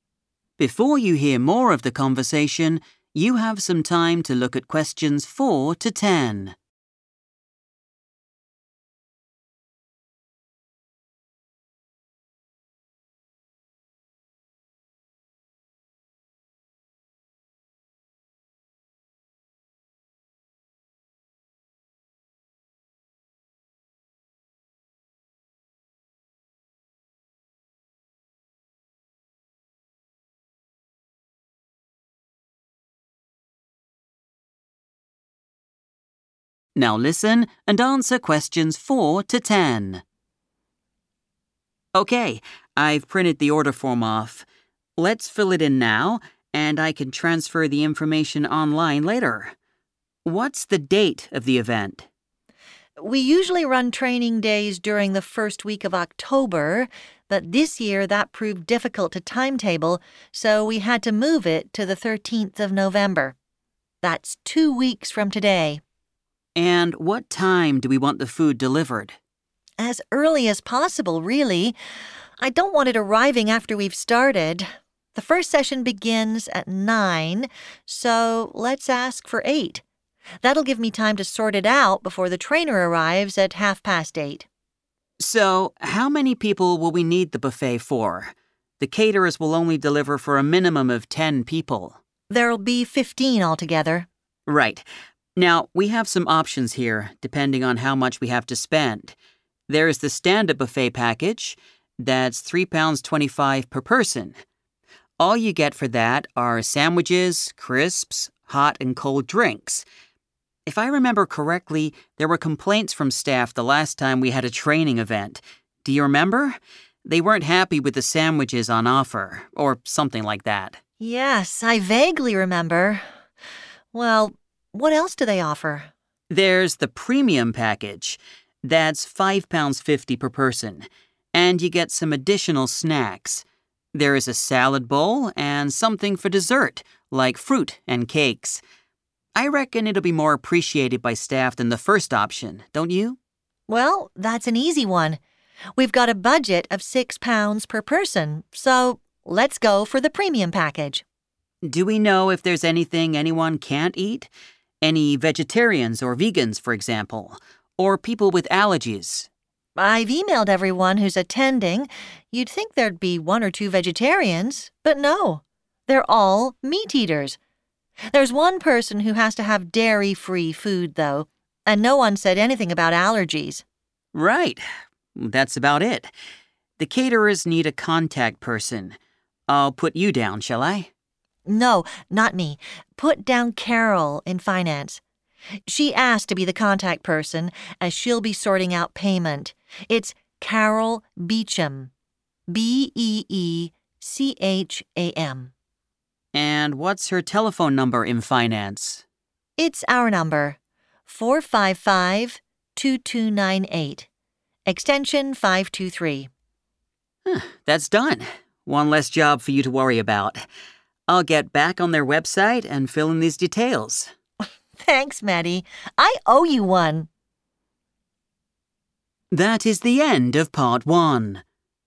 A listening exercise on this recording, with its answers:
Complete the form below. Write NO MORE THAN TWO WORDS AND/OR A NUMBER for each answer.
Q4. Date of event: 4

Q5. Delivery time: 5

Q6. Number of people: 6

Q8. Dietary requirements: 1 person requires _____ food.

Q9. Contact person: Carol 9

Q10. Telephone number: 455 2298, Extension 10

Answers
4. 13th November / 13 November / November 13th / November 13 / 13th of November
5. 8 / 8 a.m. / 8 am / eight
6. 15 / fifteen
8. dairy-free / dairy free
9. Beecham
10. 523

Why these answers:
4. The correct answer is 13th November because Natalie explains that although they usually have these events in October, they had to change the date this year due to scheduling problems. She clearly states the new date for the event is the 13th of November.
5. The correct answer is 8:00 AM because Natalie suggests they ask for the delivery at eight. She wants the food to arrive early so she has enough time to prepare before the trainer arrives at 8:30 and the first session starts at 9:00.
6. The correct answer is 15 because Natalie explicitly states that there will be 15 people in total for the buffet. This number includes the sales team, the three office staff members, and the trainer.
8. The correct answer is identified when Natalie explains the dietary needs of the people attending the event. She notes that while there are no vegetarians, one individual requires food that is "dairy free."
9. The correct answer is Beecham because, when Matti asks who should be the contact person for the caterers, Natalie names Carol in the Finance department. She clearly states her full name and spells out the surname so there is no confusion.
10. The correct answer is 523 because Natalie gives Matti the phone details for Carol in Finance. She mentions the main office phone number and then clearly states the specific extension number needed to reach Carol. An extension is a shorter set of numbers you dial after the main number to talk to a specific person in an office.

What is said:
So, who's attending the event? Who do we need to include?
Natalie: It'll be all the sales team, of course. Then there's the office staff, three of them. Oh, and we need to feed the trainer as well.
Matti: What about the manager? Is he going to be there?
Natalie: I know he wanted to come but I don't think he'll be able to join us. His secretary just told me he has an important meeting that morning.
Matti: OK. I've printed the order form off. Let's fill it in now and I can transfer the information online later. What's the date of the event?
Natalie: We usually run training days during the first week of October but this year that proved difficult to timetable so we had to move it to the 13th of November. That's two weeks from today.
Matti: And what time do we want the food delivered?
Natalie: As early as possible, really. I don't want it arriving after we've started. The first session begins at nine so let's ask for eight. That'll give me time to sort it out before the trainer arrives at half past eight.
Matti: So, how many people will we need the buffet for? The caterers will only deliver for a minimum of 10 people.
Natalie: There'll be 15 altogether.
Matti: Right. Now we have some options here, depending on how much we have to spend. There's the Standard Buffet package. That's £3.25 per person. All you get for that are sandwiches, crisps, hot and cold drinks. If I remember correctly, there were complaints from staff the last time we had a training event. Do you remember? They weren't happy with the sandwiches on offer – or something like that.
Natalie: Yes, I vaguely remember. Well, what else do they offer?
Matti: There's the Premium package. That's £5.50 per person and you get some additional snacks. There's a salad bowl and something for dessert, like fruit and cakes. I reckon it'll be more appreciated by staff than the first option, don't you?
Natalie: Well, that's an easy one. We've got a budget of £6 per person so let's go for the Premium package.
Matti: Do we know if there's anything anyone can't eat? Any vegetarians or vegans, for example? Or people with allergies?
Natalie: I've emailed everyone who's attending. You'd think there'd be one or two vegetarians, but no. They're all meat eaters. There's one person who has to have dairy free food, though, and no one's said anything about allergies.
Matti: Right. That's about it. The caterers need a contact person. I'll put you down, shall I?
Natalie: No, not me. Put down Carol in Finance. She asked to be the contact person as she'll be sorting out payment. It's Carol Beecham. B-E-E-C-H-A-M.
Matti: And what's her telephone number in Finance?
Natalie: It's our number, 455 2298, Extension 523.
Matti: That's done. One less job for you to worry about. I'll get back on their website and fill in these details.
Natalie: Thanks, Matti! I owe you one!